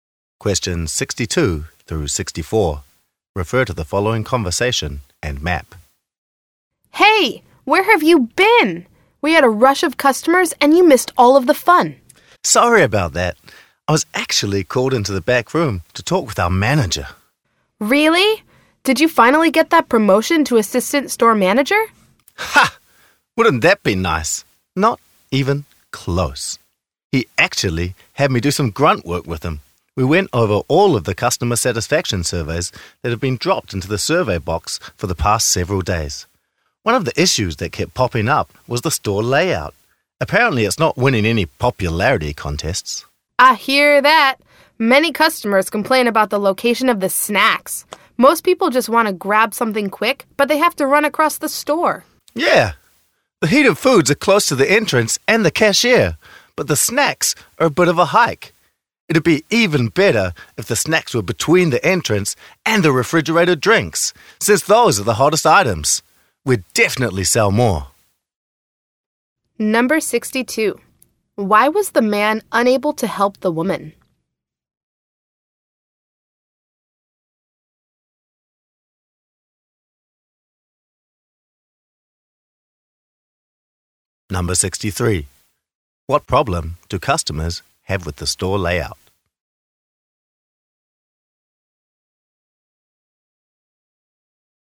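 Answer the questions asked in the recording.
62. He was in the back room with the manager reviewing surveys
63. The snacks are too far away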